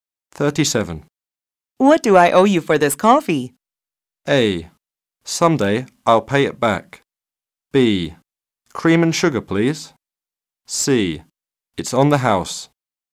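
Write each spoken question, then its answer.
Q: What do I owe you for this coffee?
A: C: It's on the house.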